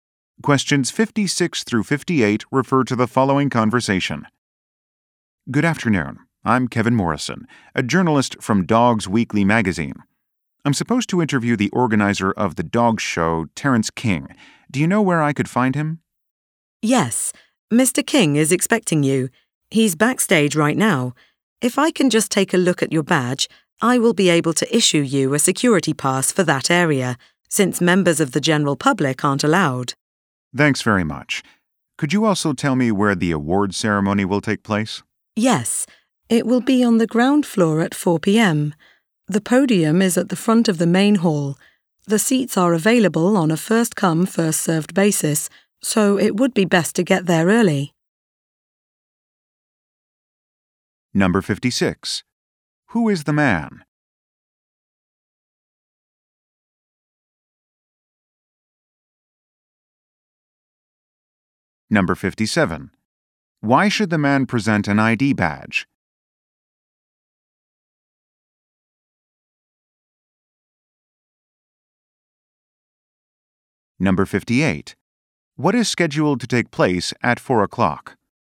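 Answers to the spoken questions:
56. A journalist
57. To get a security pass for the backstage area
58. An award ceremony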